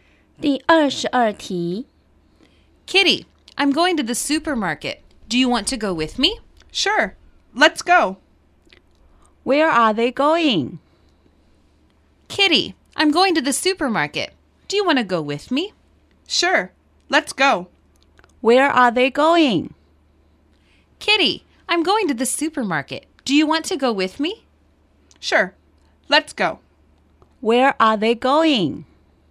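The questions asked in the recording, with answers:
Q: Where are they going?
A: To the supermarket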